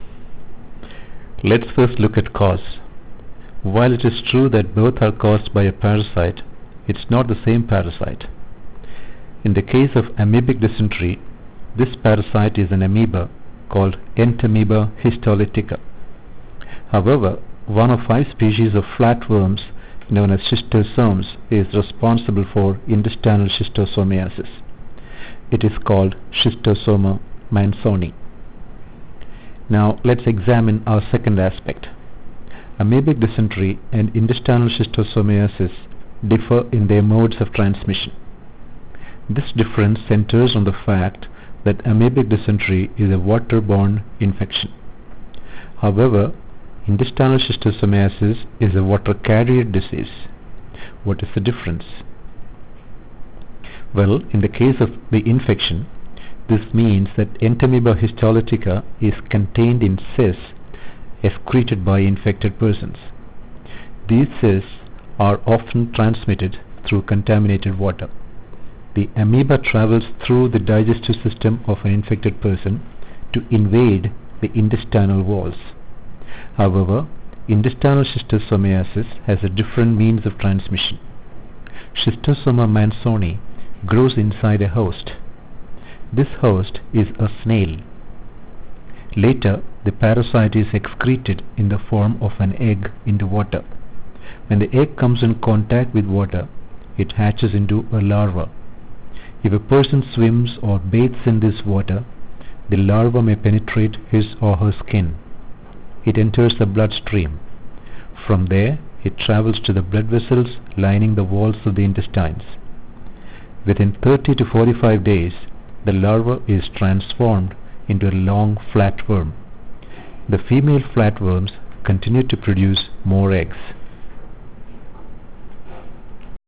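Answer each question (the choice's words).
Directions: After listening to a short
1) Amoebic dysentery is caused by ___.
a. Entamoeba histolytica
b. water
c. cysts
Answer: Entamoeba histolytica

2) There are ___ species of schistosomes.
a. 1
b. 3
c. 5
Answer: 5

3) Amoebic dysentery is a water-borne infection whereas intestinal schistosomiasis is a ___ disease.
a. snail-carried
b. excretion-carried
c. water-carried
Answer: water-carried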